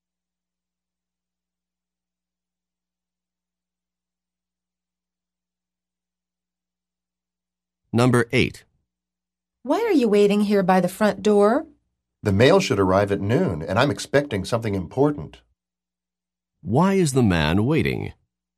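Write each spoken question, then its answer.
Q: Why is the man waiting?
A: He's expecting something important in the mail.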